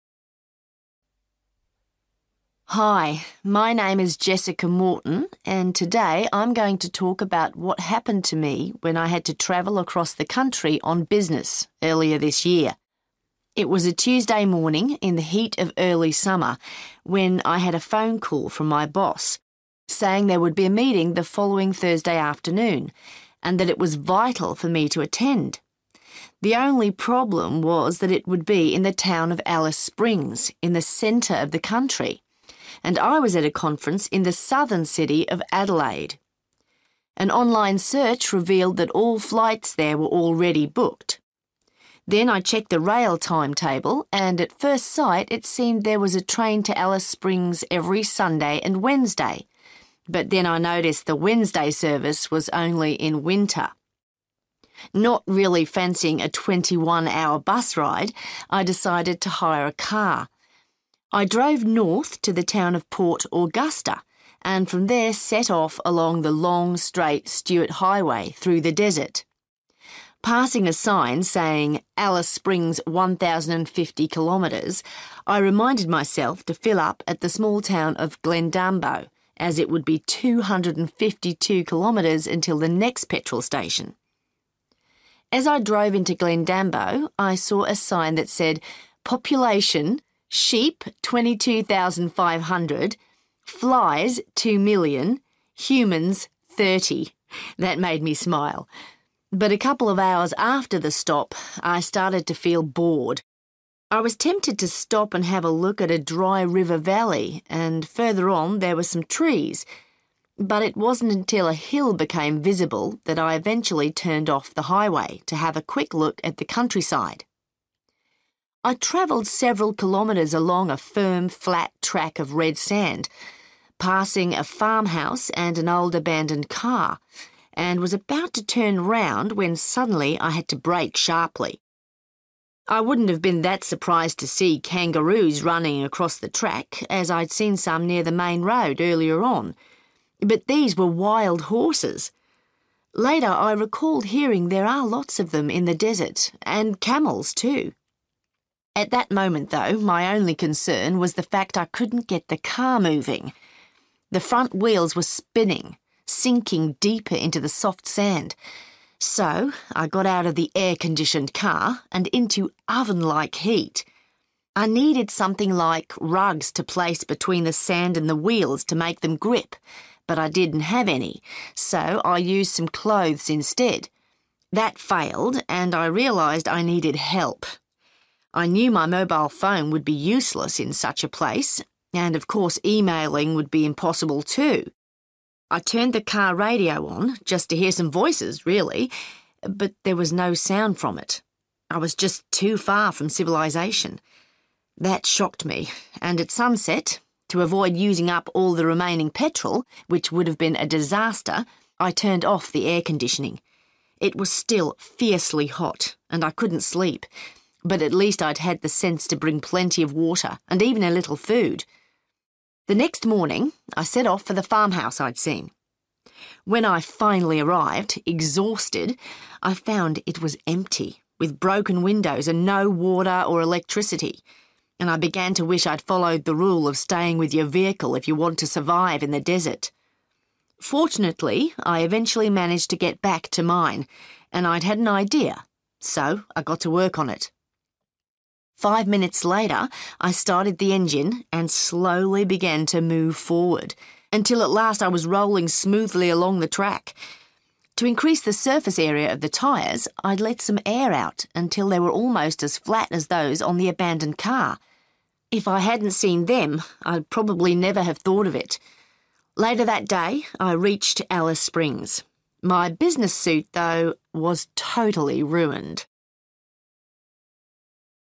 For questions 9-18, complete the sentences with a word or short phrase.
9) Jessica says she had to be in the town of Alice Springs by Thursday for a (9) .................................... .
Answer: meeting

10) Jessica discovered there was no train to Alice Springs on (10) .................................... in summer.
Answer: Wednesday(s)

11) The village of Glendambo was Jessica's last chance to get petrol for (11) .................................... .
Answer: 252 kilometres

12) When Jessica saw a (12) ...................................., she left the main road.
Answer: hill

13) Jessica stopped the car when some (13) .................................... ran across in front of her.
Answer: (wild) horses

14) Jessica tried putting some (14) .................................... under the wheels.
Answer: clothes

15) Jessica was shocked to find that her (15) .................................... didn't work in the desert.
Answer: (car) radio

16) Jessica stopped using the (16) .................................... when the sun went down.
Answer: air-conditioning

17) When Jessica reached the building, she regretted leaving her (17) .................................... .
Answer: vehicle

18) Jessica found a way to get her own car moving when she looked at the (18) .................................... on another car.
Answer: (flat) tyres

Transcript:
Hi, my name is Jessica Morton and today I'm going to talk about what happened to me when I had to travel across the country on business earlier this year. It was a Tuesday morning in the heat of early summer when I had a phone call from my boss, saying there would be a meeting the following Thursday afternoon, and that it was vital for me to attend. The only problem was that it would be in the town of Alice Springs, in the centre of the country, and I was at a conference in the southern city of Adelaide. An online search revealed that all flights there were already booked. Then I checked the rail timetable and at first sight it seemed there was a train to Alice Springs every Sunday and Wednesday, but then I noticed the Wednesday service was only in winter. Not really fancying a 21-hour bus ride, I decided to hire a car. I drove north to the town of Port Augusta, and from there set off along the long, straight Stuart Highway through the desert. Passing a sign saying 'Alice Springs 1,050 kilometres', I reminded myself to fill up at the small town of Glendambo, as it would be 252 kilometres until the next petrol station. As I drove into Glendambo, I saw a sign that said 'Population: sheep 22,500, flies 2 million, humans 30'. That made me smile, but a couple of hours after the stop I started to feel bored. I was tempted to stop and have a look at a dry river valley, and further on there were some trees, but it wasn't until a hill became visible that I eventually turned off the highway to have a quick look at the countryside. I travelled several kilometres along a firm, flat track of red sand, passing a farmhouse and an old abandoned car, and was about to turn round when suddenly I had to brake sharply. I wouldn't have been that surprised to see kangaroos running across the track as I'd seen some near the main road earlier on, but these were wild horses. Later I recalled hearing there are lots of them in the desert, and camels, too. At that moment, though, my only concern was the fact I couldn't get the car moving. The front wheels were spinning, sinking deeper into the soft sand, so I got out of the air-conditioned car – and into oven-like heat. I needed something like rugs to place between the sand and the wheels to make them grip, but I didn't have any so I used some clothes instead. That failed, and I realised I needed help. I knew my mobile phone would be useless in such a place, and of course emailing would be impossible, too. I turned the car radio on, just to hear some voices, really – but there was no sound from it. I was just too far from civilisation.
That shocked me, and at sunset, to avoid using up all the remaining petrol – which would've been a disaster – I turned off the air-conditioning. It was still fiercely hot and I couldn't sleep, but at least I'd had the sense to bring plenty of water, and even a little food. The next morning, I set off for the farmhouse I'd seen. When I finally arrived, exhausted, I found it was empty, with broken windows and no water or electricity, and I began to wish I'd followed the rule of staying with your vehicle if you want to survive in the desert. Fortunately, I eventually managed to get back to mine, and I'd had an idea so I got to work on it. Five minutes later, I started the engine and slowly began to move forward, until at last I was rolling smoothly along the track. To increase the surface area of the tyres, I'd let some air out until they were almost as flat as those on the abandoned car. If I hadn't seen them I'd probably never have thought of it. Later that day I reached Alice Springs. My business suit, though, was totally ruined.